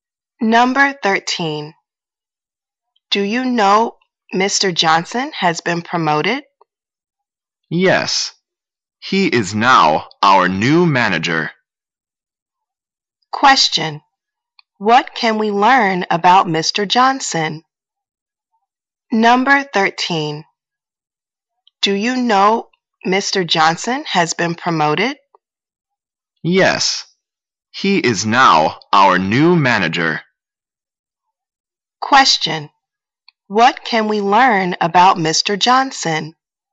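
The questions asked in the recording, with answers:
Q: What can we learn about Mr.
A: He has been promoted to manager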